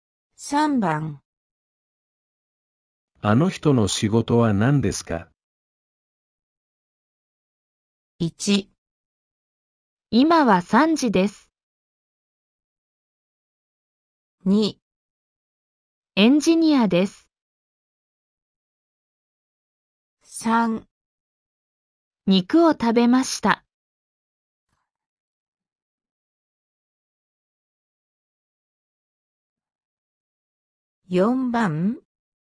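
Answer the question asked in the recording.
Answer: 2

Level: N5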